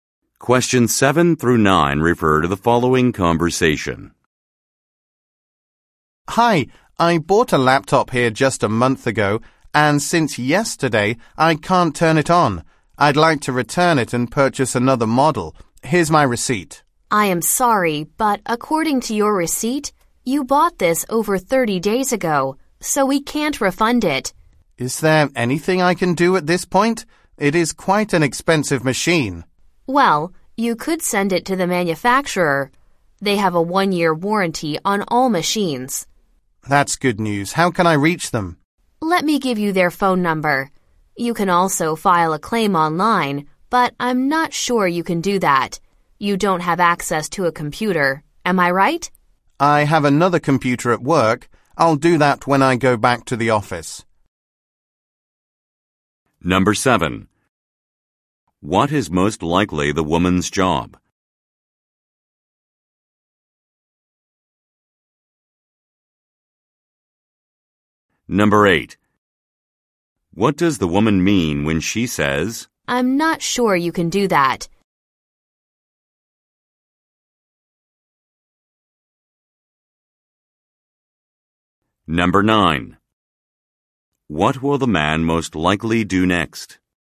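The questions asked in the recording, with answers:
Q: What is most likely the woman's job?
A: Salesclerk at an electronics store

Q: What does the woman mean when she says,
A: She thinks the man may not have access to a computer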